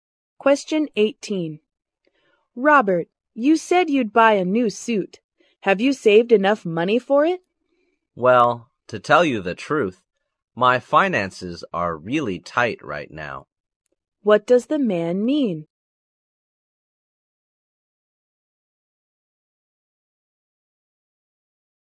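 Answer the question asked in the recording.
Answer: He hasn't saved enough money for the suit.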